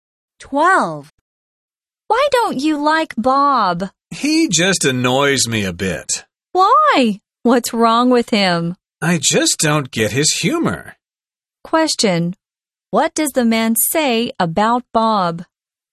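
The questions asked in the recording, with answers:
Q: What does the man say about Bob?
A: He doesn't get Bob's humor; Bob annoys him a bit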